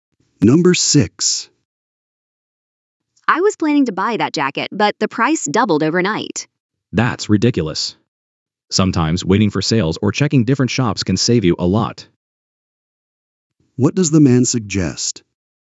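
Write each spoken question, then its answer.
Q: What does the man suggest?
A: Waiting for sales or checking different shops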